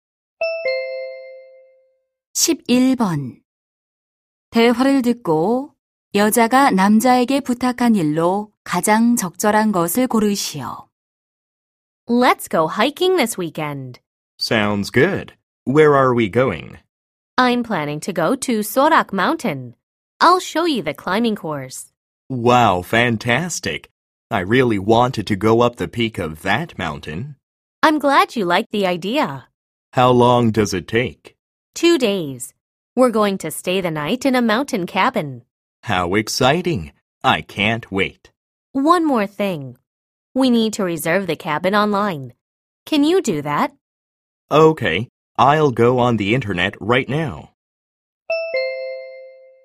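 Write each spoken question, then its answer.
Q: 대화를 듣고 여자가 남자에게 부탁한 일로 가장 적절한 것을 고르시오.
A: 산장 온라인 예약하기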